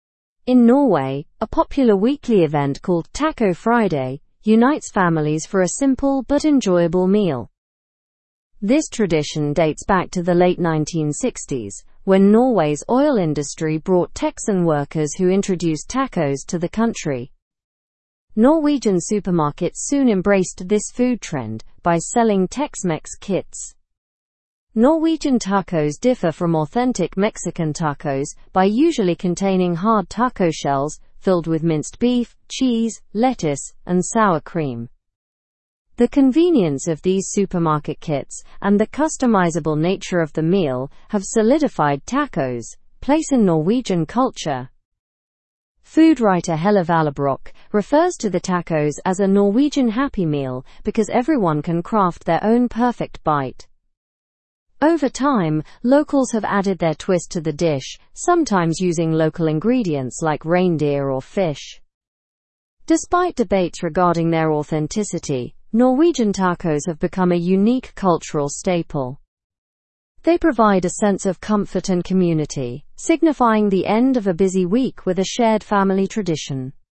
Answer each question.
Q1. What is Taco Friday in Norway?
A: A weekly family gathering to enjoy tacos.

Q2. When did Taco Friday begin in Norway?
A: It traces back to the late 1960s.

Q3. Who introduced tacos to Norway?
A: Texan workers involved in the oil industry.

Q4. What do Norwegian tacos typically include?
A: They include hard taco shells, minced beef, cheese, lettuce, and sour cream.

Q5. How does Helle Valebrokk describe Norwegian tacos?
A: She calls them a "Norwegian Happy Meal."

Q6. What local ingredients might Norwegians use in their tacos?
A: They might use ingredients like reindeer or fish.

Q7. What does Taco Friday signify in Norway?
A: It marks the end of a busy week with a family tradition.

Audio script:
In Norway, a popular weekly event called Taco Friday unites families for a simple but enjoyable meal. This tradition dates back to the late 1960s when Norway's oil industry brought Texan workers who introduced tacos to the country. Norwegian supermarkets soon embraced this food trend by selling Tex-Mex kits.
Norwegian tacos differ from authentic Mexican tacos by usually containing hard taco shells filled with minced beef, cheese, lettuce, and sour cream. The convenience of these supermarket kits and the customizable nature of the meal have solidified tacos' place in Norwegian culture.
Food writer Helle Valebrokk refers to the tacos as a "Norwegian Happy Meal" because everyone can craft their own perfect bite. Over time, locals have added their twist to the dish, sometimes using local ingredients like reindeer or fish.
Despite debates regarding their authenticity, Norwegian tacos have become a unique cultural staple. They provide a sense of comfort and community, signifying the end of a busy week with a shared family tradition.

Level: (Level 3)